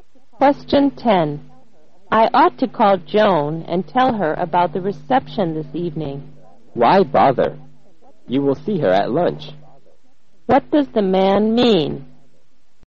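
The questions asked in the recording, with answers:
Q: What does the man mean?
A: She doesn't need to call Joan; she can tell her at lunch.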